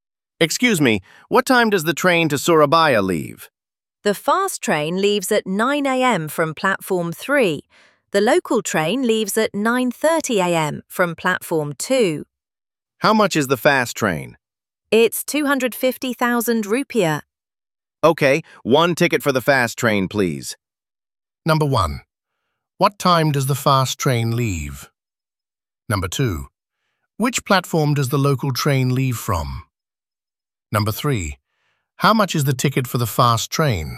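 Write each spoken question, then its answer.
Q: What time does the fast train leave?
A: 9 a.m.

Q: Which platform does the local train leave from?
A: Platform 2

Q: How much is the ticket for the fast train?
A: 250,000 rupiah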